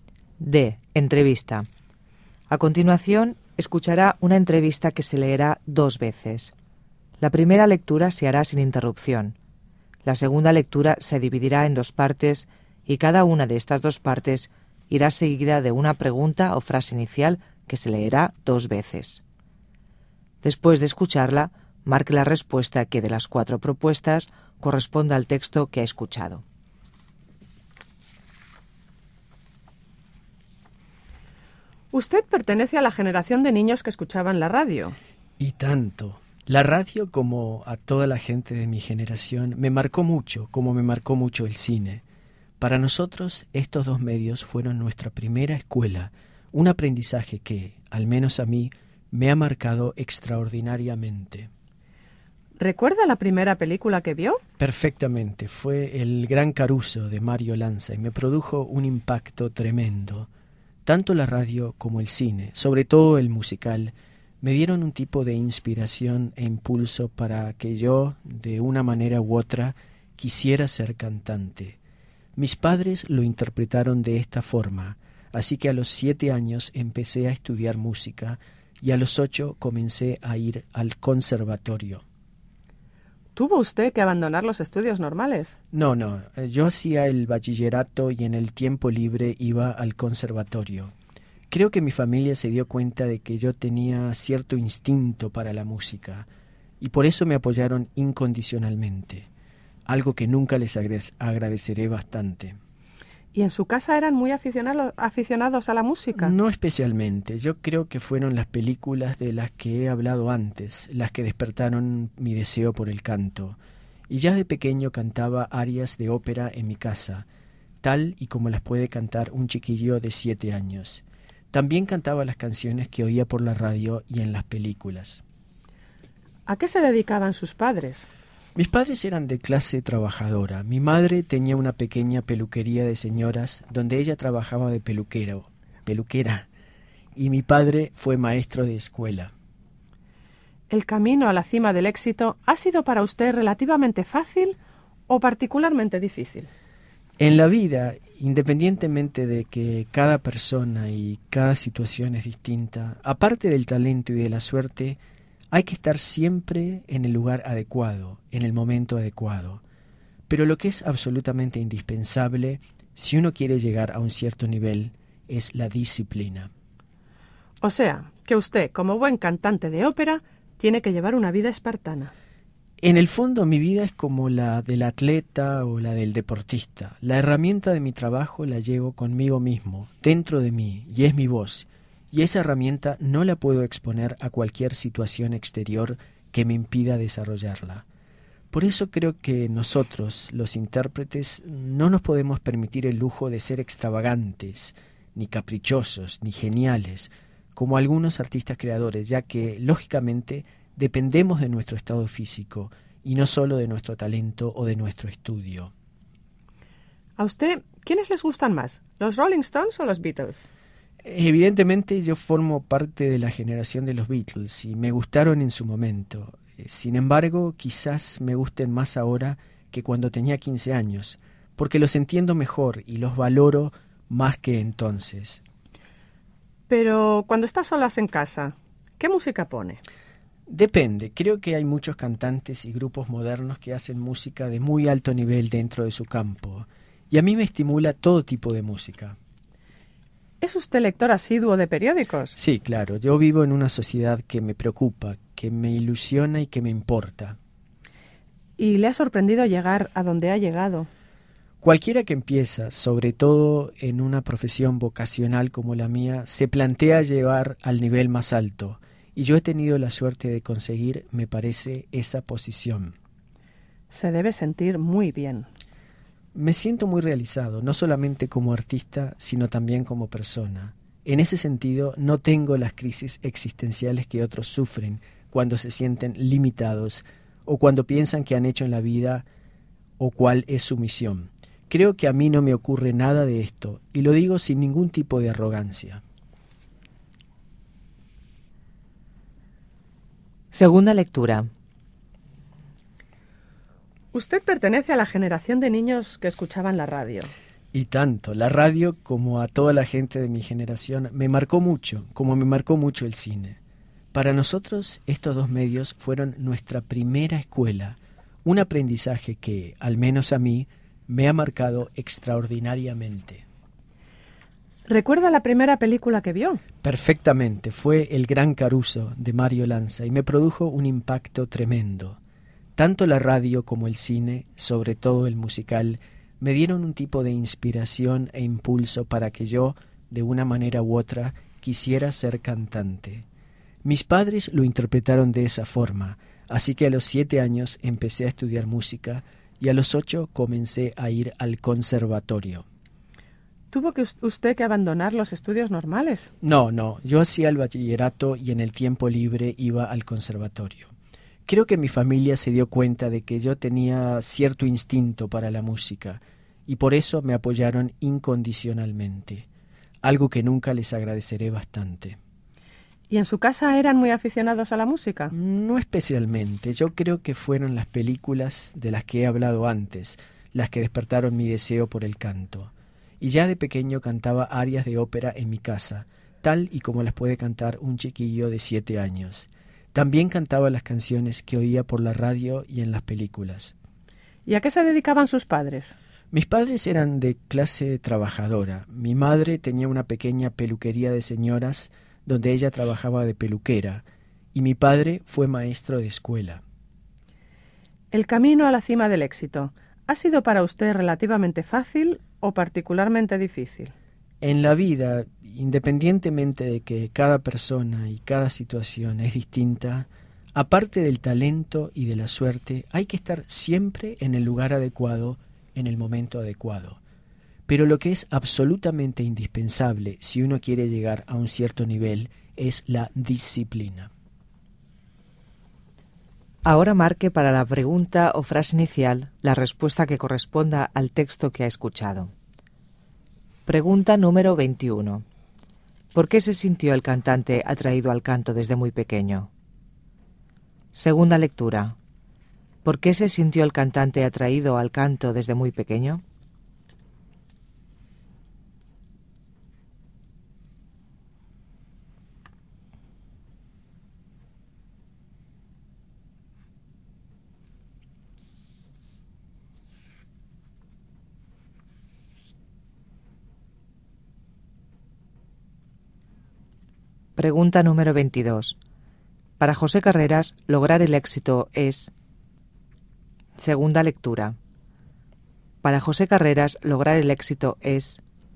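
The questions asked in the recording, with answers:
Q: ¿Por qué se sintió el cantante atraído al canto desde muy pequeño?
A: Por la radio y el cine, sobre todo las películas musicales como El Gran Caruso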